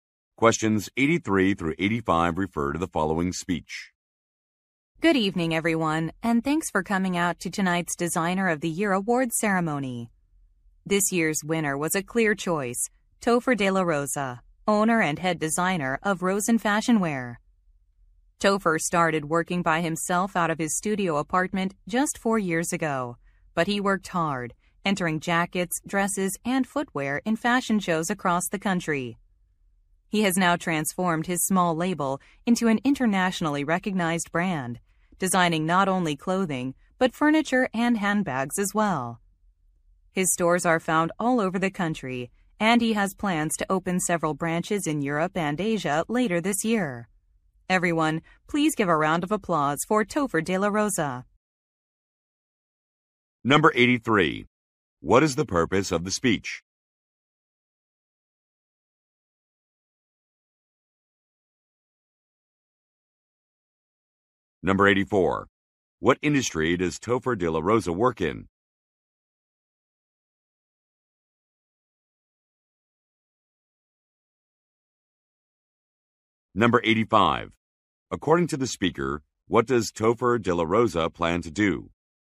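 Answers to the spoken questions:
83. To present the Designer of the Year award
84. Fashion
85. Open branches in Europe and Asia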